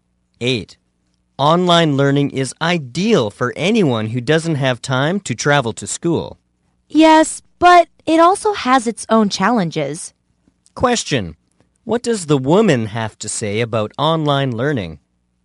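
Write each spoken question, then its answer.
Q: What does the woman have to say about online learning?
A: It has its own challenges.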